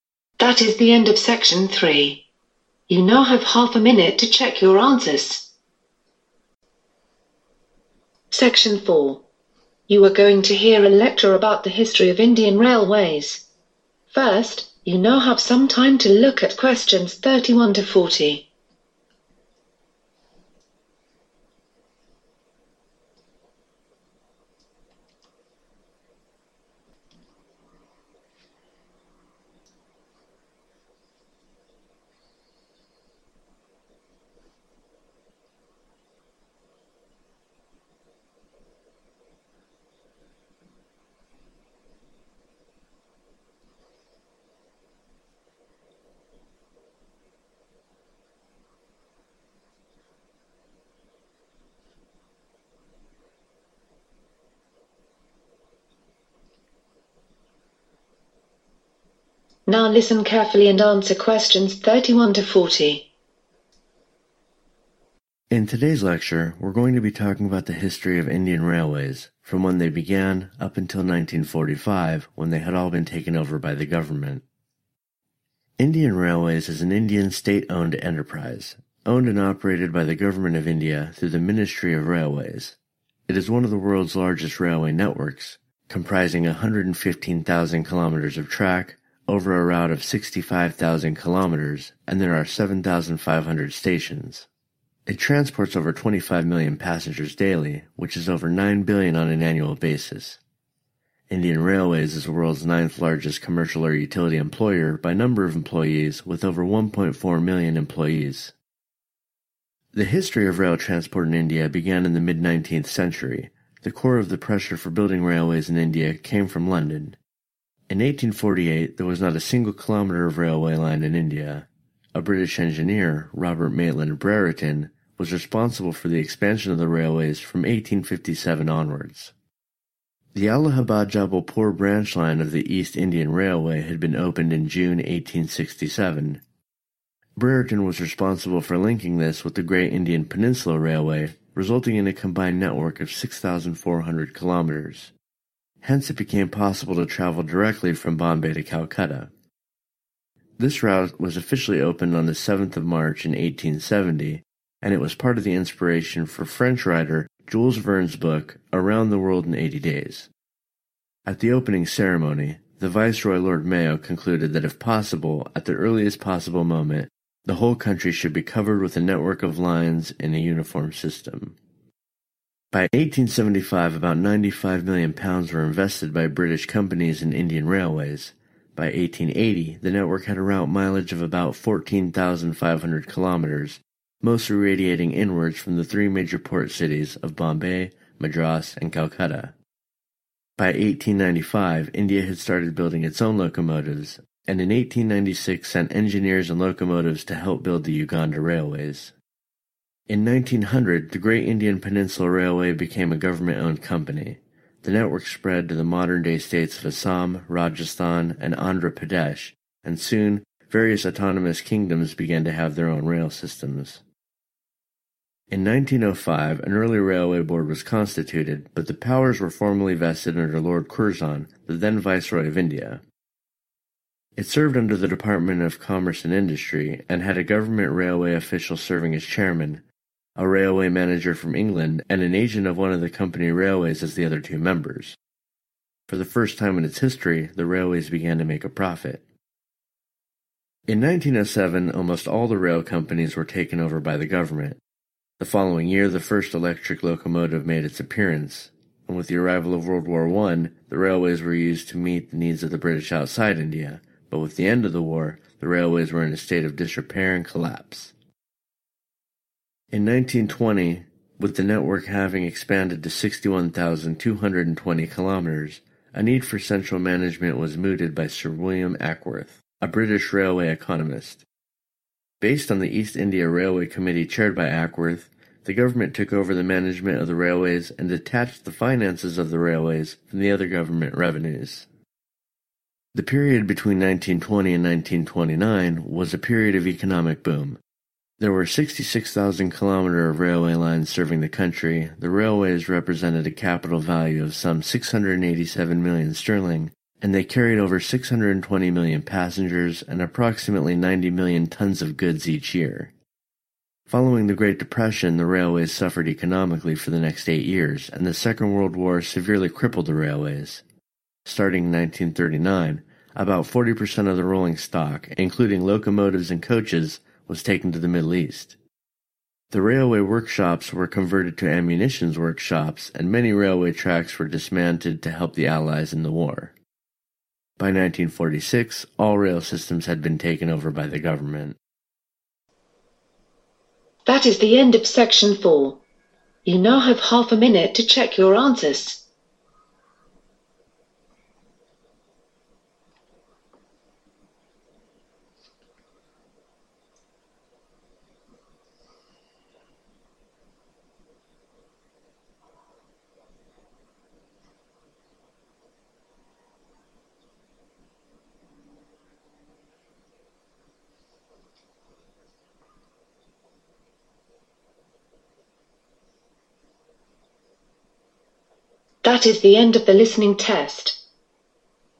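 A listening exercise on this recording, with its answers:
Complete the sentences below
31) Indian Railways is owned and .............by the government of India.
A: operated

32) There are more than ..............million people working for Indian Railways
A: 1.4

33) The .................of the railways from 1857 occurred under Robert Maitland Brereton.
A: expansion

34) The joining of the East Indian Railway with the Great Indian Peninsula Railway led to a network of .............kilometres.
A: 6,400

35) The route from Bombay to Calcutta, opened in 1870, was an ..............for the book Around the World in 80 days.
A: inspiration

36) The network radiated inward from (36)............. , Madras, and Calcutta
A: Bombay

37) It was not long before various independent kingdoms had their own (37)............... .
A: rail systems

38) When the war finished the railways were suffering from (38) ........... 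and.............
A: disrepair and collapse

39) Between 1920 and 1929, the railways had a (39) ................ of around £687 million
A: capital value

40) The rolling stock that was moved to the Middle East included locomotives and (40) .............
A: coaches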